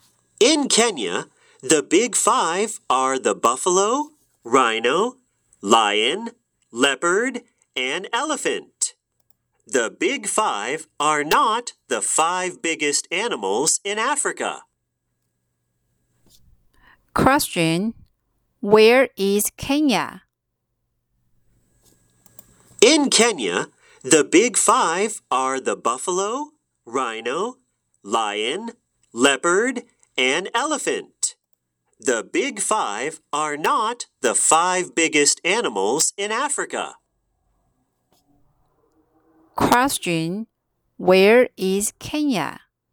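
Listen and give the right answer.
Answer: In Africa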